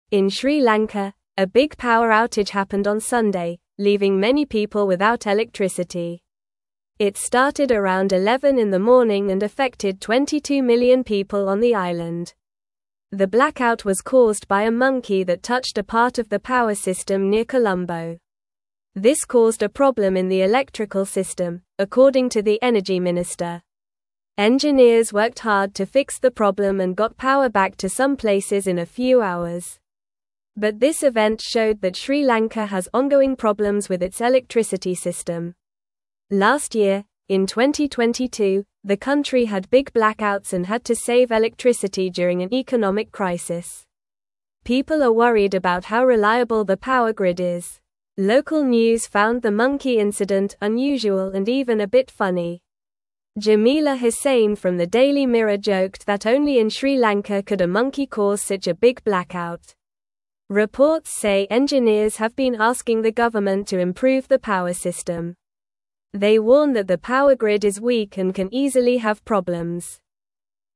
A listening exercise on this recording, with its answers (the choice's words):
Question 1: What caused the power outage in Sri Lanka?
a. A storm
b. A car accident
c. A tree falling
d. A monkey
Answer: A monkey

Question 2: How many people were affected by the blackout?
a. 22 million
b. 10 million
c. 5 million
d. 50 million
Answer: 22 million

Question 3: Where did the power outage happen?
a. Near Colombo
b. In the mountains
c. By the sea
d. In the capital city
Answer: Near Colombo

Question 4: What did the Energy Minister say about the blackout?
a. It was caused by a storm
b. It was planned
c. It was a joke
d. It was a problem in the electrical system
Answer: It was a problem in the electrical system

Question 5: How long did it take to fix the power in some places?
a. A few days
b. A few hours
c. A few minutes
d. A few weeks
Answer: A few hours

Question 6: What were people worried about after the blackout?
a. The price of electricity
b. The power grid's reliability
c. The weather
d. The monkey's safety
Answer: The power grid's reliability

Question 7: What do engineers want the government to do?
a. Lower electricity prices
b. Stop using monkeys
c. Improve the power system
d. Build more houses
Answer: Improve the power system

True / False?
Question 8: People are confident about how reliable the power grid is.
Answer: False

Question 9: The blackout began around 11 in the evening.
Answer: False

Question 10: Some places got their power back in a few hours.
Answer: True

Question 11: Sri Lanka has had problems with its electricity system before.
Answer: True

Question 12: The power outage impacted 20 million people.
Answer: False

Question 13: A monkey avoided touching a part of the power system near Colombo.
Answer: False

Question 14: A big power outage happened in Sri Lanka on Sunday.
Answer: True

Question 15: Engineers worked hard to fix the electricity problem.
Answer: True

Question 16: In Sri Lanka, a big power outage happened on Sunday, leaving many (1)______ without electricity.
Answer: people

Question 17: It started around 11 in the morning and (2)______ 22 million people on the (3)______.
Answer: affected

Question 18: It started around 11 in the morning and (2)______ 22 million people on the (3)______.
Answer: island

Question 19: Engineers worked hard to fix the problem and got (4)______ back to some (5)______ in a few hours.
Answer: power

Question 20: Engineers worked hard to fix the problem and got (4)______ back to some (5)______ in a few hours.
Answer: places

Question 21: But this (6)______ showed that Sri Lanka has ongoing problems with its electricity (7)______.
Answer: event

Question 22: But this (6)______ showed that Sri Lanka has ongoing problems with its electricity (7)______.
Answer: system

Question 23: (8)______ year, in 2022, the country had big (9)______ and had to save electricity during an economic crisis.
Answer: Last

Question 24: (8)______ year, in 2022, the country had big (9)______ and had to save electricity during an economic crisis.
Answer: blackouts

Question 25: Jamila Husain from the (10)______ Mirror joked that only in Sri Lanka could a monkey cause such a big blackout.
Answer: Daily

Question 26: Reports say engineers have been (11)______ the government to improve the power system.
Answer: asking

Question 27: They (12)______ that the power grid is weak and can easily have problems.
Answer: warn

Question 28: What happened in Sri Lanka on Sunday?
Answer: A big power outage happened, leaving many people without electricity.

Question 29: How many people were affected by the power outage?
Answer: 22 million people were affected by the power outage.

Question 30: What caused the blackout according to the Energy Minister?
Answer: A monkey touched a part of the power system near Colombo, which caused the blackout.

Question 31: How long did it take for engineers to fix the power in some places?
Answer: It took engineers a few hours to fix the power in some places.

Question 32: Why are people worried about the electricity system in Sri Lanka?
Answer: People are worried because the power grid is weak and can easily have problems.

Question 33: What do engineers want the government to do about the power system?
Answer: Engineers want the government to improve the power system.

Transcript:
In Sri Lanka, a big power outage happened on Sunday, leaving many people without electricity. It started around 11 in the morning and affected 22 million people on the island. The blackout was caused by a monkey that touched a part of the power system near Colombo. This caused a problem in the electrical system, according to the Energy Minister.
Engineers worked hard to fix the problem and got power back to some places in a few hours. But this event showed that Sri Lanka has ongoing problems with its electricity system. Last year, in 2022, the country had big blackouts and had to save electricity during an economic crisis. People are worried about how reliable the power grid is.
Local news found the monkey incident unusual and even a bit funny. Jamila Husain from the Daily Mirror joked that only in Sri Lanka could a monkey cause such a big blackout. Reports say engineers have been asking the government to improve the power system. They warn that the power grid is weak and can easily have problems.

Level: Level 2